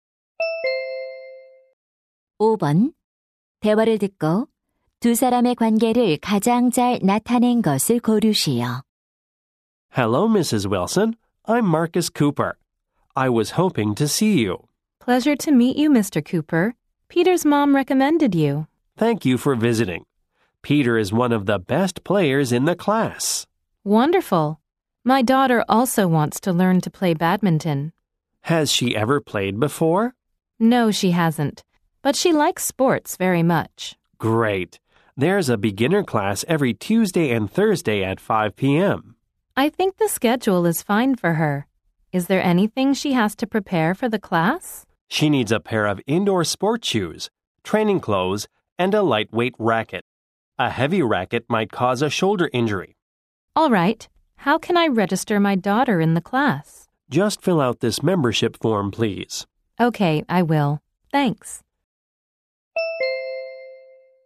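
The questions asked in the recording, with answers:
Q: 대화를 듣고 두 사람의 관계를 가장 잘 나타낸 것을 고르시오.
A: 배드민턴 코치 - 학부모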